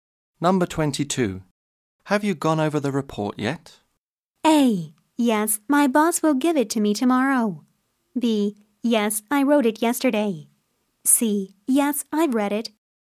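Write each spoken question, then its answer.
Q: Have you gone over the report yet?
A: C: Yes, I've read it.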